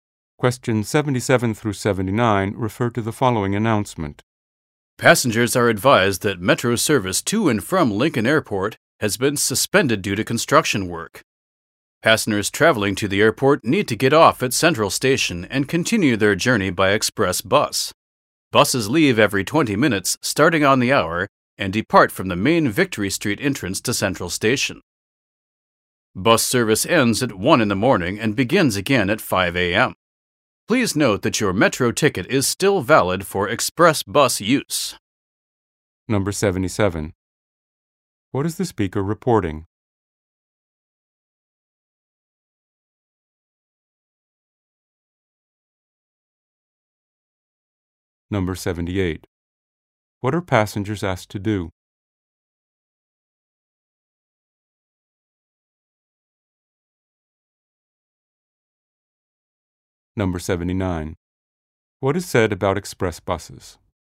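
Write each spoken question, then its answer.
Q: What is the speaker reporting?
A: Metro service to the airport is suspended due to construction

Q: What are passengers asked to do?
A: Get off at Central Station and take an express bus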